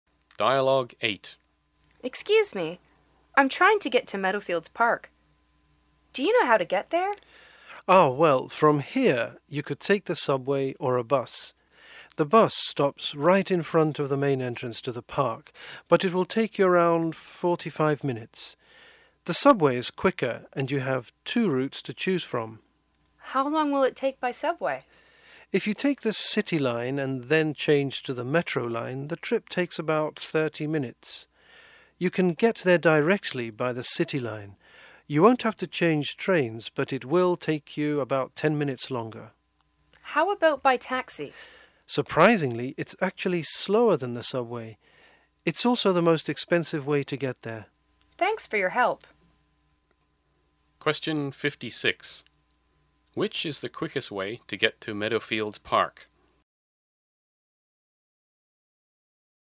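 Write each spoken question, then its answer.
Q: Which is the quickest way to get to Meadowfields Park?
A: By subway, taking the City Line and changing to the Metro Line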